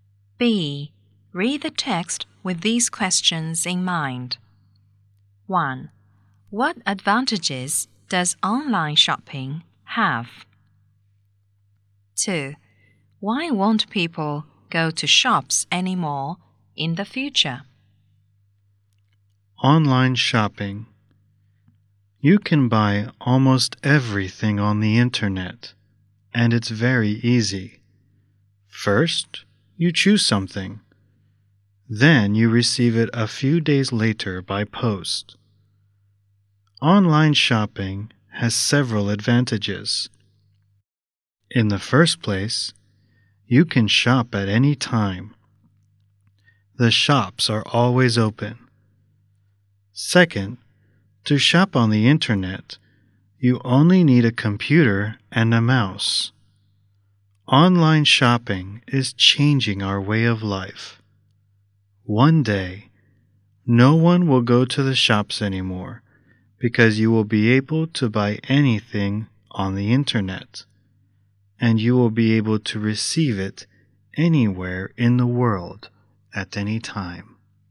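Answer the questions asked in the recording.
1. You can shop at any time because the shops are always open, and you only need a computer and a mouse.
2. Because they will be able to buy anything on the internet and receive it anywhere in the world at any time.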